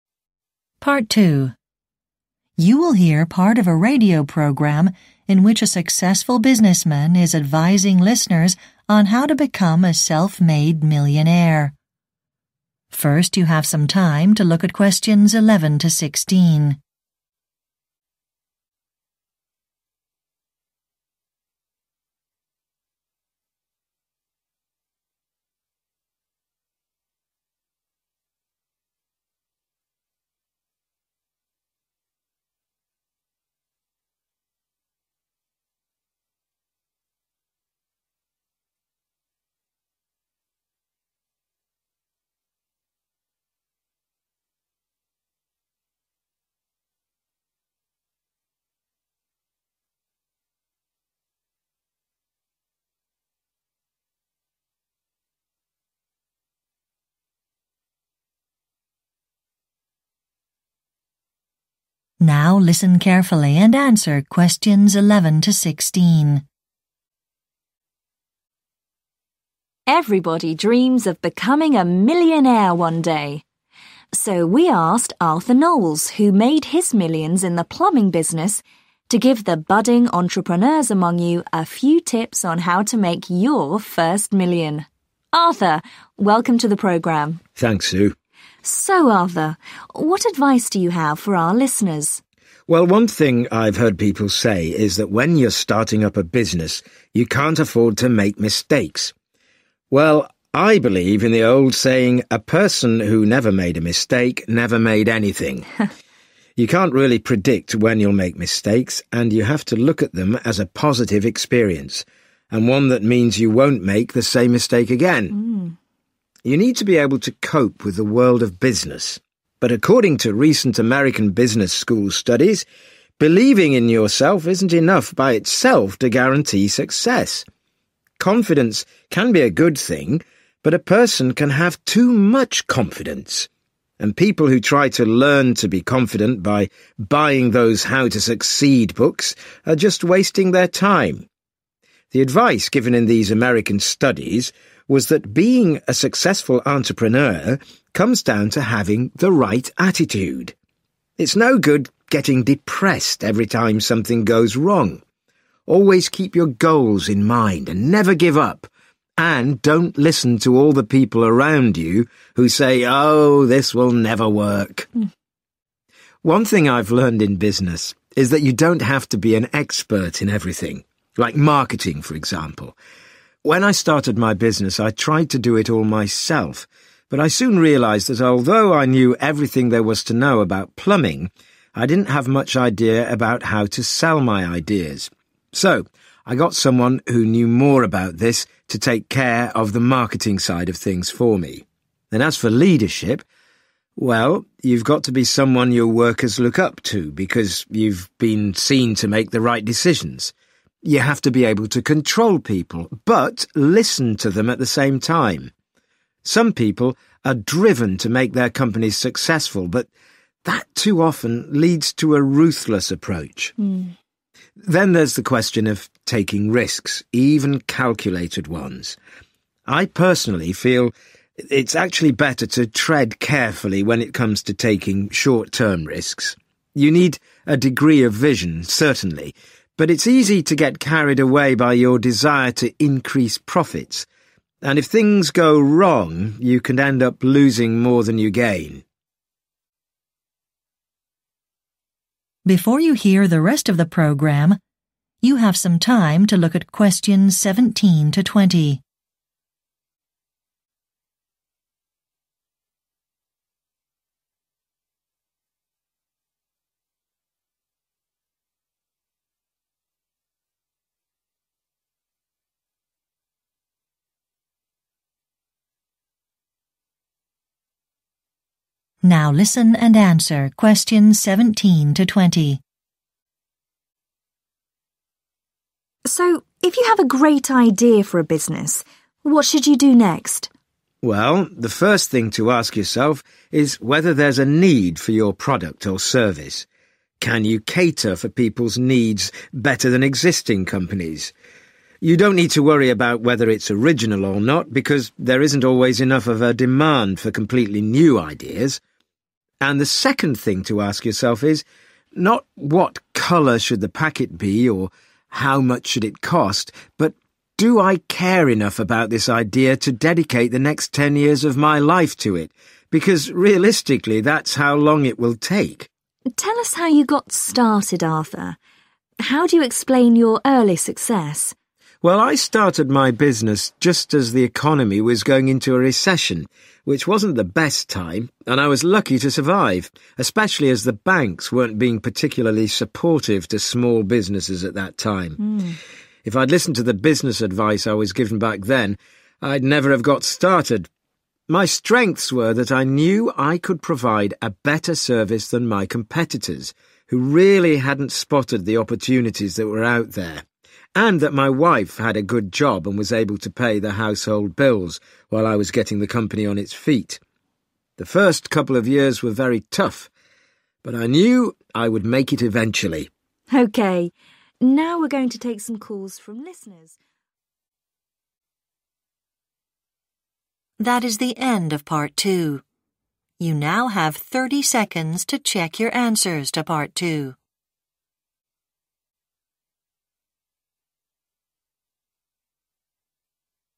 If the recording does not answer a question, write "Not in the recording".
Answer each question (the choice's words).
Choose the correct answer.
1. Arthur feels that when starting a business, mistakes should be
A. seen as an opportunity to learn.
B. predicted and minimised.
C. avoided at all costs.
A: seen as an opportunity to learn.

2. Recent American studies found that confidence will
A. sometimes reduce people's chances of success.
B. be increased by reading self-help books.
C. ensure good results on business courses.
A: sometimes reduce people's chances of success.

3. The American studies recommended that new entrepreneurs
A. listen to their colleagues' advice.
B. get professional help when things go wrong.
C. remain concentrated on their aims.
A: remain concentrated on their aims.

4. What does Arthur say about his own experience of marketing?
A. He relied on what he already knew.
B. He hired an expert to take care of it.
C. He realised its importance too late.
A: He hired an expert to take care of it.

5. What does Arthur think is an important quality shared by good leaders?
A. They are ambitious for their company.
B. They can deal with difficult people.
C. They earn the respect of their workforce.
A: They earn the respect of their workforce.

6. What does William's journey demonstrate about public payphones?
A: Not in the recording

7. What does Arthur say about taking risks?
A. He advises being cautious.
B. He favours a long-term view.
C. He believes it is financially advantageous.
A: He advises being cautious.